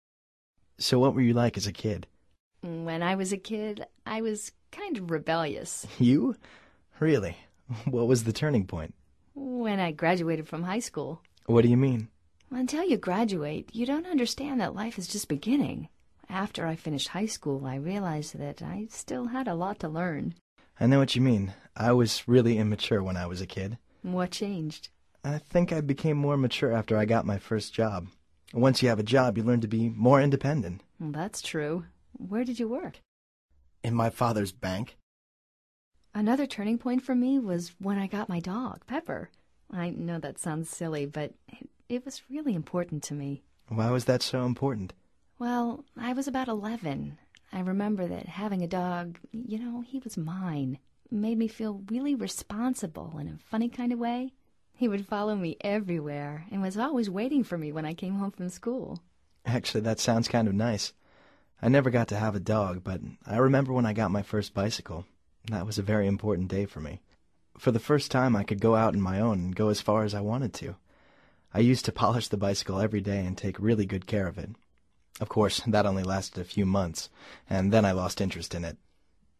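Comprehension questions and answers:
Activity 13: Basándote en los comentarios anteriores responde estas preguntas. Verifica luego las respuestas correctas.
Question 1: What was Luisa like as a kid?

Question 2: What was her turning point?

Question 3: What did she realize after she finished high school?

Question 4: What was Daniel like as a kid?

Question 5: What happened after he got his first job?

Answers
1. She was kind of rebellious.
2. When she graduated from high school.
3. That she still had a lot to learn.
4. He was really immature.
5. He became more mature and independent.

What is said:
So what were you like as a kid?
When I was a kid, I was kind of rebellious.
You? Really? What was the turning point?
When I graduated from high school.
What do you mean?
Until you graduate, you don't understand that life is just beginning. After I finished high school, I realized that I still had a lot to learn.
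I know what you mean. I was really immature when I was a kid.
What changed?
I think I became more mature after I got my first job. Once you have a job, you learn to be more independent.
That's true. Where did you work?
In my father's bank.
Another turning point for me was when I got my dog, Pepper. I know that sounds silly, but it was really important to me.
Why was that so important?
Well, I was about eleven. I remember that having a dog – you know, he was mine – made me feel really responsible in a funny kind of way. He would follow me everywhere and was always waiting for me when I came home from school.
Actually, that sounds kind of nice. I never got to have a dog, but I remember when I got my first bicycle. That was a very important day for me. For the first time, I could go out on my own and go as far as I wanted to. I used to polish the bicycle every day and take really good care of it. 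Of course, that only lasted a few months, and then I lost interest in it!

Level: Nivel Avanzado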